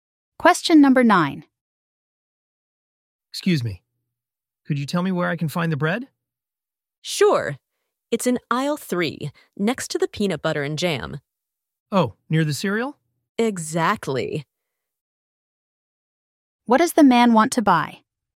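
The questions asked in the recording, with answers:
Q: What does the man want to buy?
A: Bread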